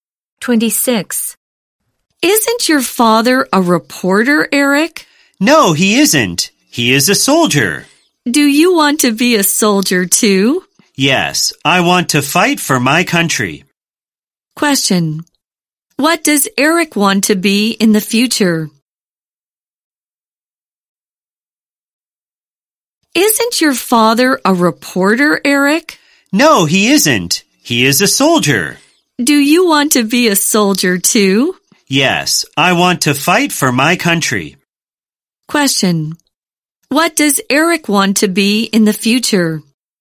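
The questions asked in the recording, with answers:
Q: Question. What does Eric want to be in the future?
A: A soldier.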